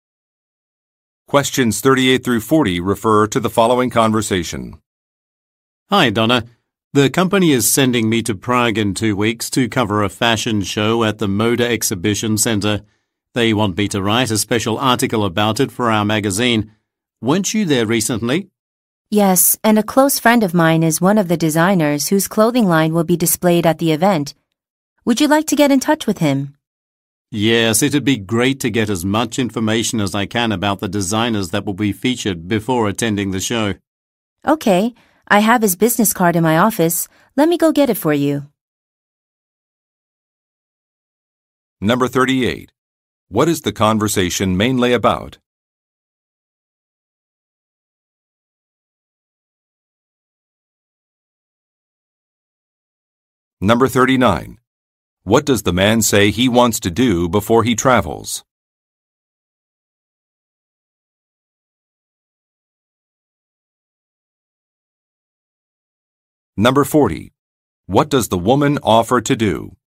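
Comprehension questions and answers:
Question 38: What is the conversation mainly about?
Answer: Reporting on an event

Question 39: What does the man say he wants to do before he travels?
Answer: Research some designers

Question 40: What does the woman offer to do?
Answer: Find some contact information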